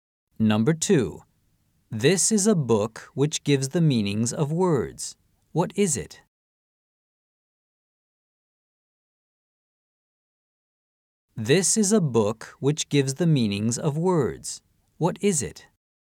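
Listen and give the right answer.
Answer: 辞書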